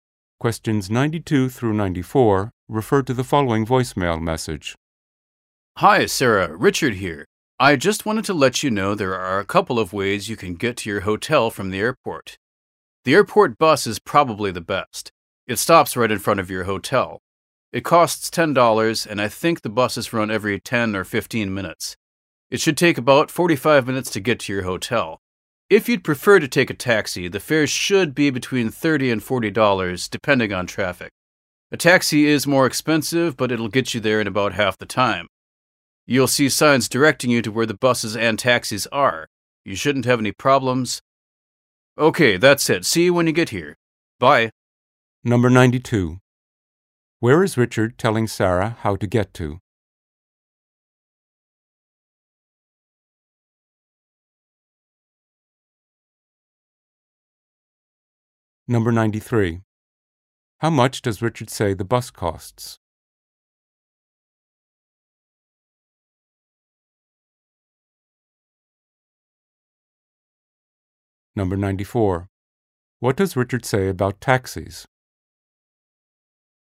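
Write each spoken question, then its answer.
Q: Where is Richard telling Sarah how to get to?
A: Her hotel

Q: How much does Richard say the bus costs?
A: $10

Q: What does Richard say about taxis?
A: They are more expensive but faster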